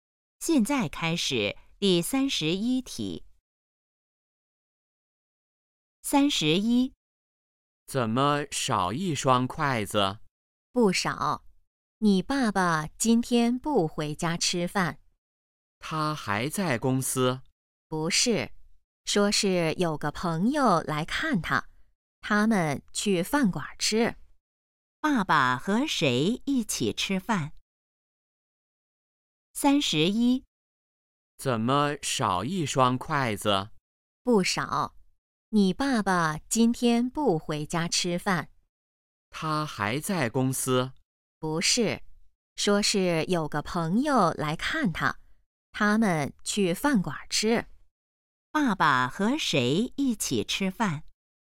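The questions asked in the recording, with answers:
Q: 爸爸和谁一起吃饭?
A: 朋友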